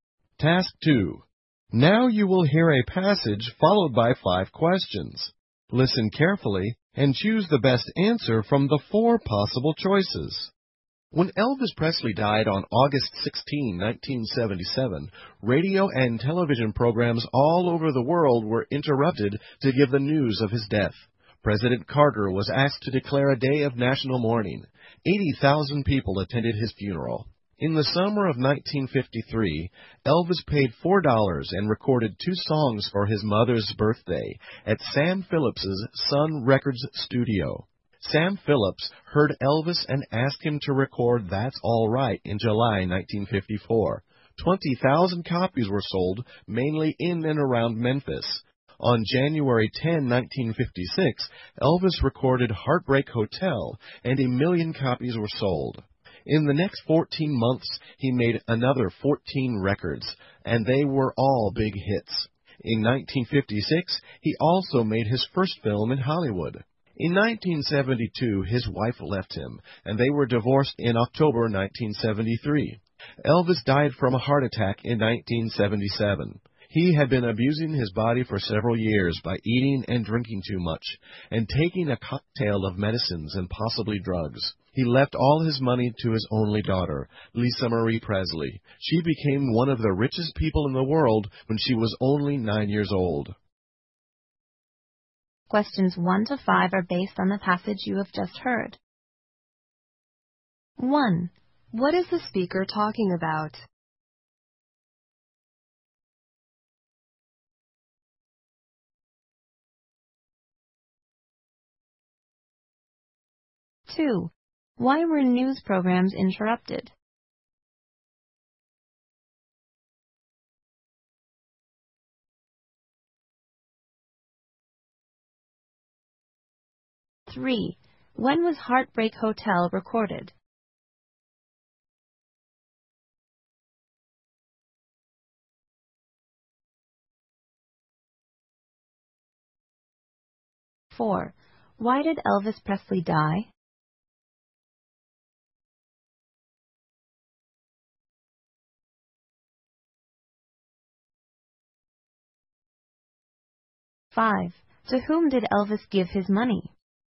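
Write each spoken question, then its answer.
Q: What is the speaker talking about?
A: Elvis Presley's life

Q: Why were news programs interrupted?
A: To report Elvis Presley's death

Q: When was Heartbreak Hotel recorded?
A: On January 10, 1956

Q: Why did Elvis Presley die?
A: He had a heart attack after years of abusing his body

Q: To whom did Elvis give his money?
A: His only daughter, Lisa Marie Presley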